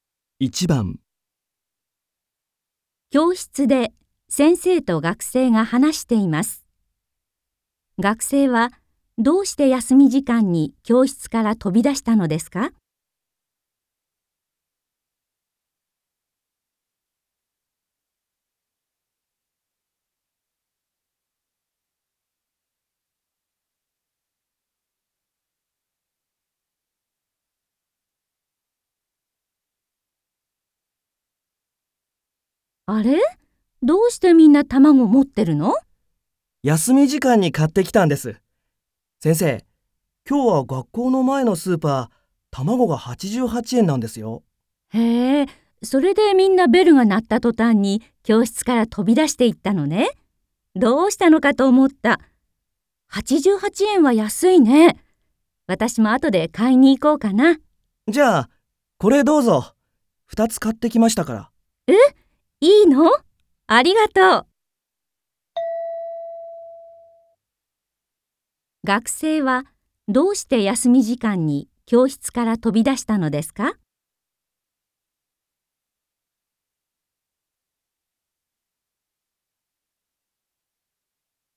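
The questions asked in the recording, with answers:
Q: 学生はどうして休み時間に教室から飛び出したのですか?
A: 学校の前のスーパーで卵が安い(88円)ので、買いに行ったから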